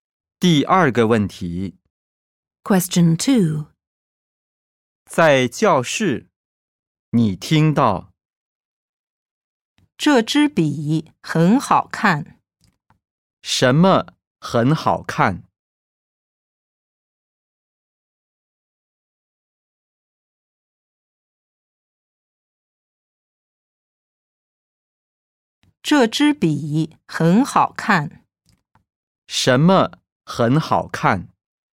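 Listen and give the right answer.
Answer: 这支笔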